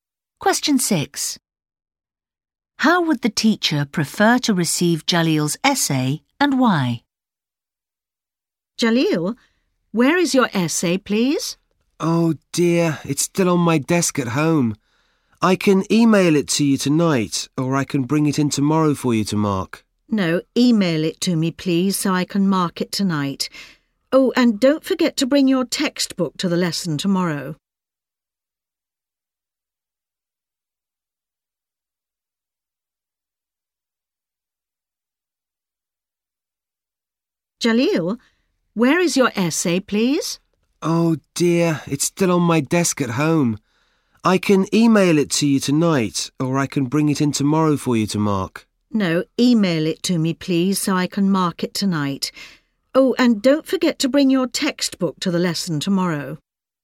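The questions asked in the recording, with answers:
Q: How would the teacher prefer to receive Jaleel's essay and why?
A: By email, so she can mark it tonight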